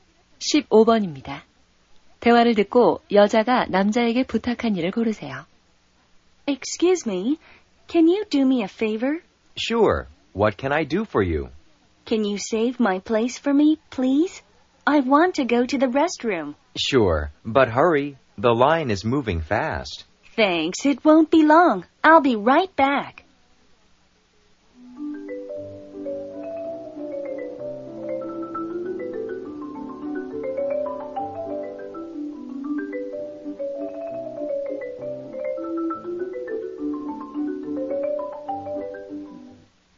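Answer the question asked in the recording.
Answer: 줄에서 자리를 맡아 주기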